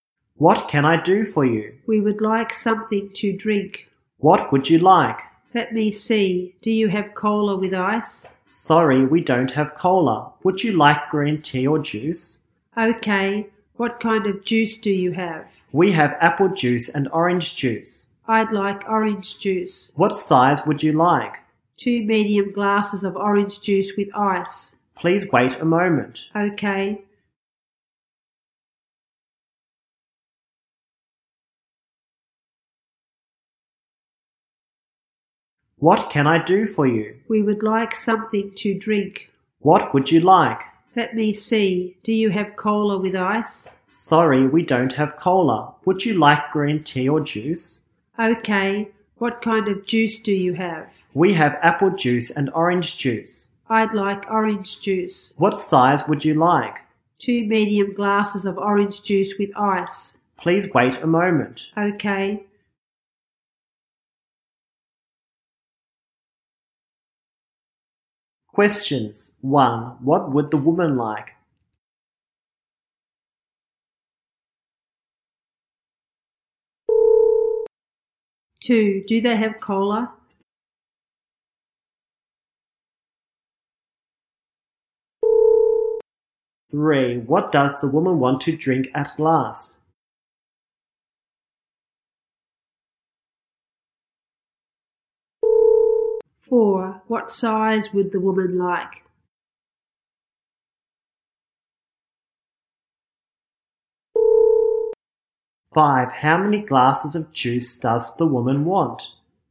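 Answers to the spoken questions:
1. Something to drink
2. No, they don't.
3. Orange juice
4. Medium
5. Two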